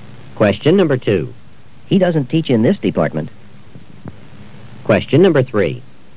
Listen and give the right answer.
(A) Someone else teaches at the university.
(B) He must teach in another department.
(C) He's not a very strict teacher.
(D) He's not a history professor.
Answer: (B) He must teach in another department.

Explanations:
He doesn't teach this department.

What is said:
Julie had better go to the supermarket right away because her sister is coming for lunch.
2. He doesn't teach this department.